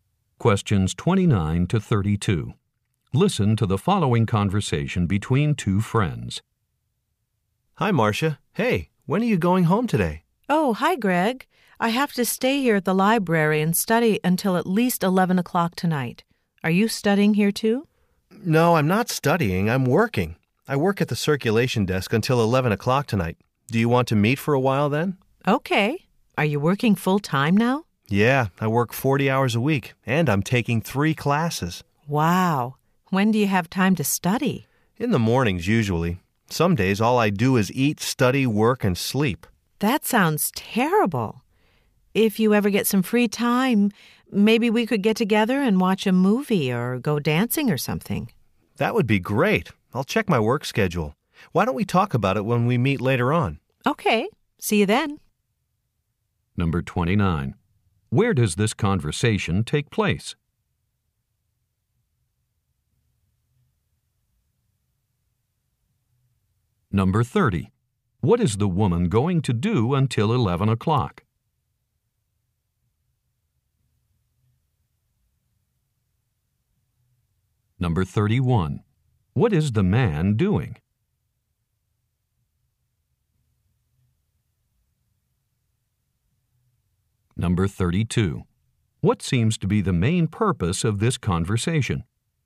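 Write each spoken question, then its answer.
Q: Where does this conversation take place?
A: In the library

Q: What is the woman going to do until 11 o'clock?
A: Study at the library

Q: What is the man doing?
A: Working at the library circulation desk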